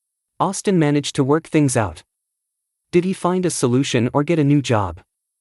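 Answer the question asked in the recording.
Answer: He found a solution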